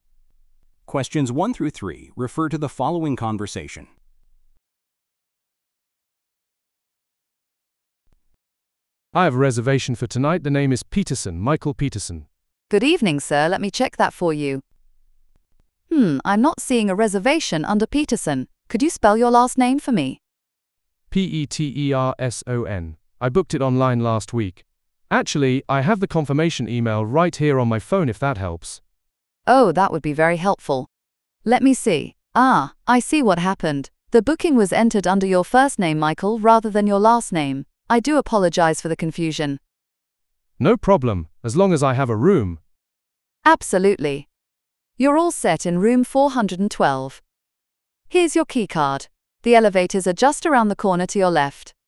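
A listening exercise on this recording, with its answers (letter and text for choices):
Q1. Where does this conversation most likely take place?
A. At a hotel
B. At an airport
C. At a travel agency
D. At a restaurant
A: A. At a hotel

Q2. What is the problem?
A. The room is not ready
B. The payment was declined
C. The reservation cannot be located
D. The hotel is fully booked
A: C. The reservation cannot be located

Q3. How is the issue resolved?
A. By offering a room upgrade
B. By calling the manager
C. By checking another hotel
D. By searching under a different name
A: D. By searching under a different name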